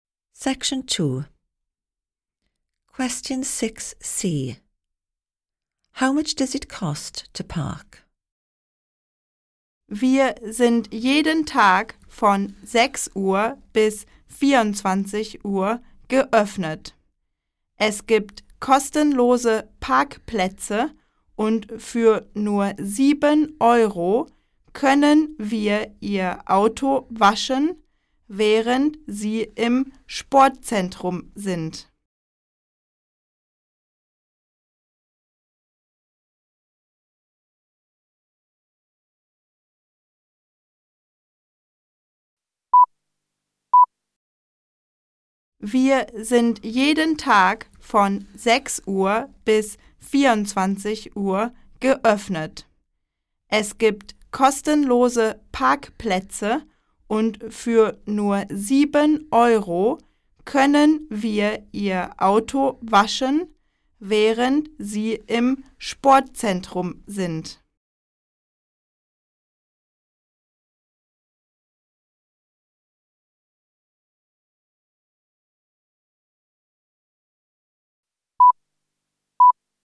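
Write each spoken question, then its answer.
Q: How much does it cost to park?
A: Nothing, parking is free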